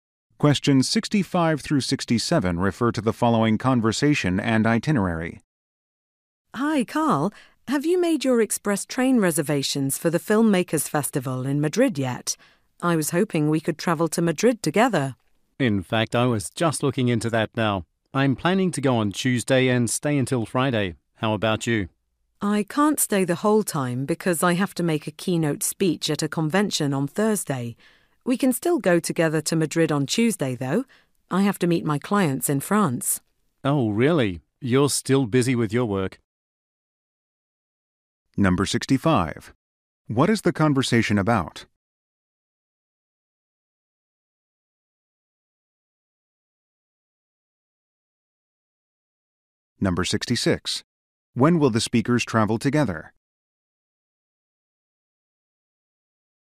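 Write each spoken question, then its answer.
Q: What is the conversation about?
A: Train travel to a film festival in Madrid

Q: When will the speakers travel together?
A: On Tuesday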